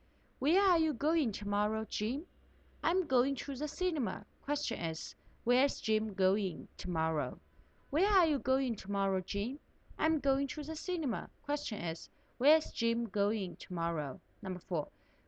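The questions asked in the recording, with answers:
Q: where's Jim going tomorrow?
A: To the cinema.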